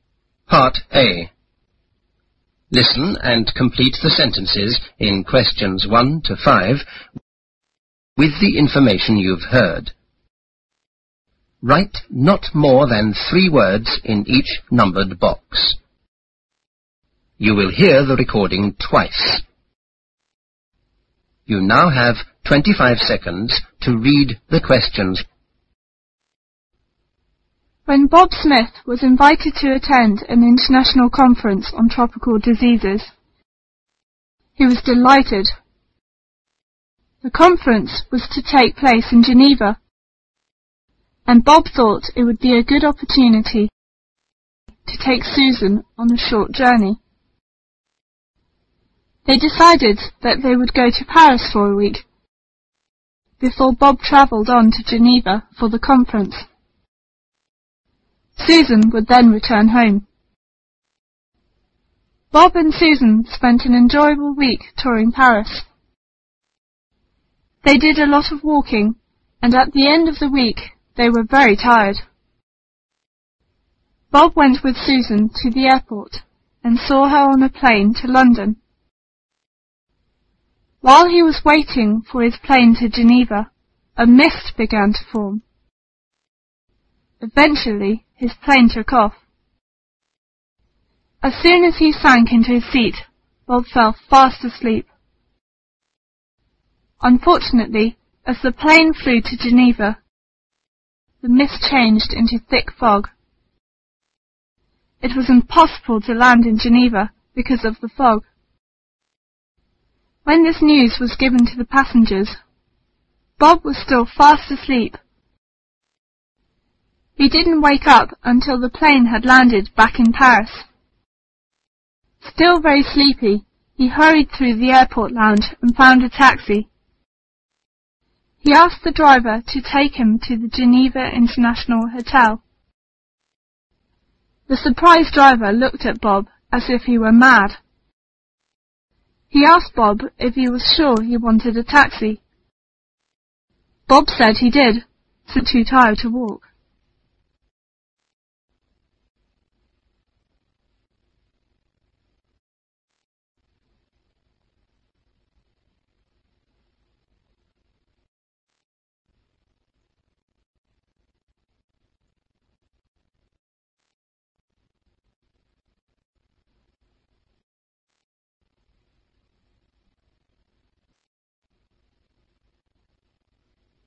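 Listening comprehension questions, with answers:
Listen and complete the sentences in questions 1--5.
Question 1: Bob Smith was invited to attend a meeting on( )disease.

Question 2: The ( )was to take place in Geneva.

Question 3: At the end of the week,Bob and his wife were both ( )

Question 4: It was impossible to land in Geneva because of the ( ).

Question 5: At last,the plane landed back in ( )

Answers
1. tropical
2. conference
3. very tired
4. fog
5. Paris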